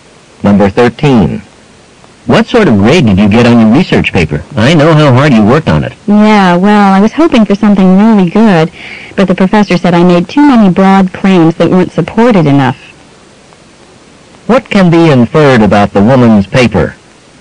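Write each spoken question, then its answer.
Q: What can be inferred about the woman's paper?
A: It got a disappointing grade because its claims lacked support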